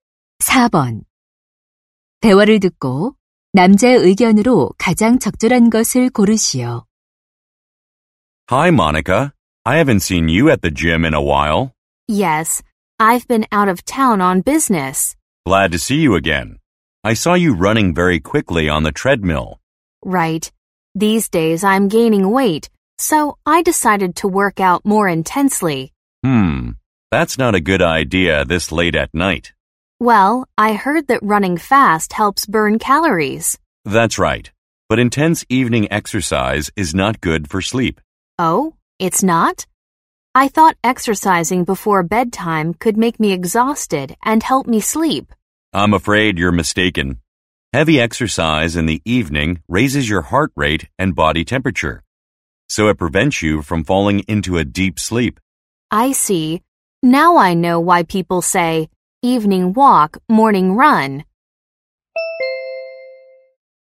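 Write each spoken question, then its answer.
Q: 대화를 듣고 남자의 의견으로 가장 적절한 것을 고르시오.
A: 저녁의 격렬한 운동은 숙면에 방해가 된다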